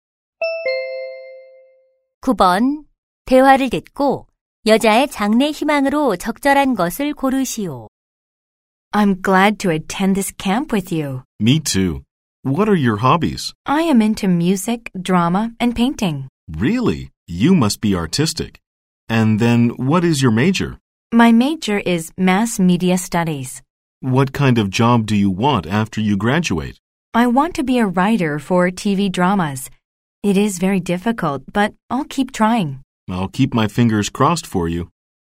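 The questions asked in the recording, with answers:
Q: 대화를 듣고 여자의 장래 희망으로 적절한 것을 고르시오.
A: TV 드라마 작가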